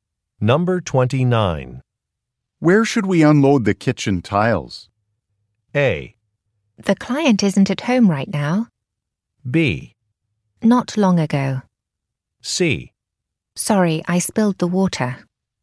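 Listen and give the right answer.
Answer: A: The client isn't at home right now.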